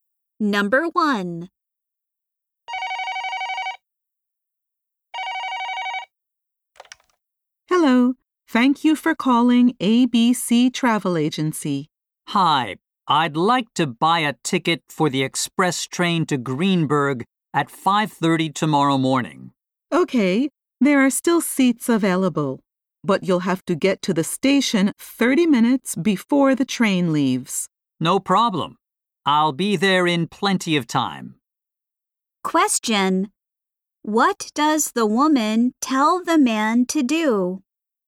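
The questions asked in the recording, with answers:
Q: What does the woman tell the man to do?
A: Get to the station 30 minutes before the train leaves.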